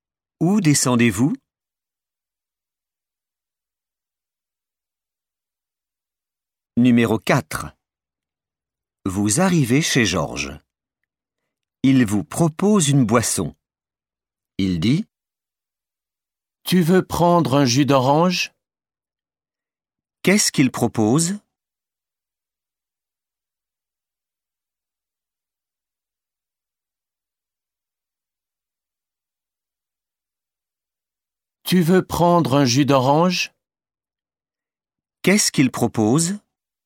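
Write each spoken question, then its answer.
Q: Qu'est-ce qu'il propose?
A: un jus d'orange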